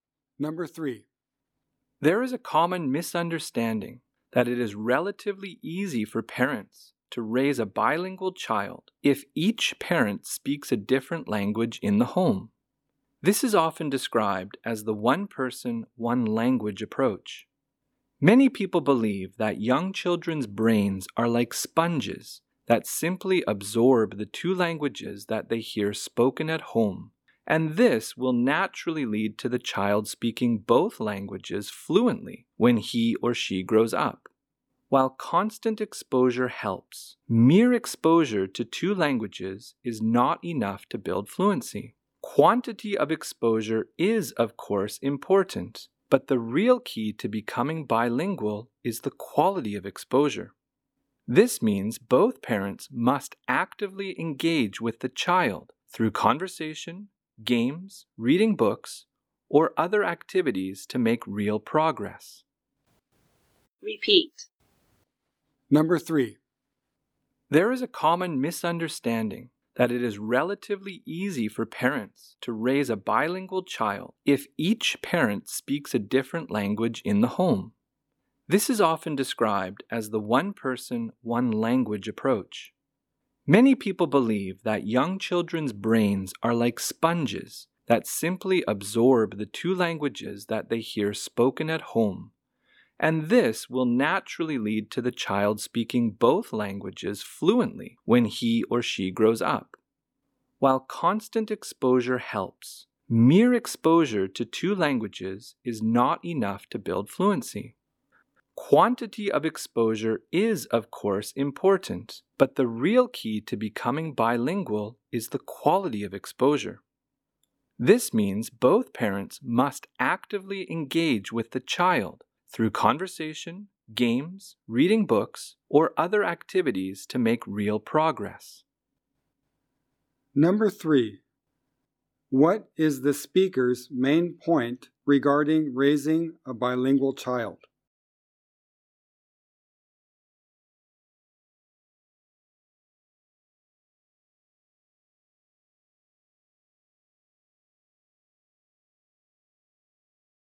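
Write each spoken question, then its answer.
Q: What is the speaker's main point regarding raising a bilingual child?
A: Just hearing two languages is not enough; the quality of exposure matters, so both parents must actively engage with the child.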